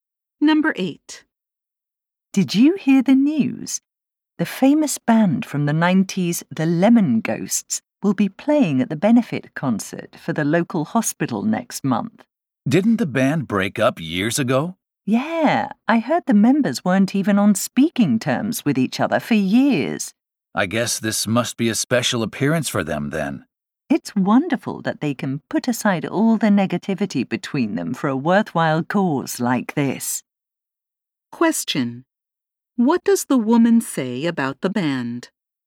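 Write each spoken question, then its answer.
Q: What does the woman say about the band?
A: It's wonderful that they can put aside their differences for a worthwhile cause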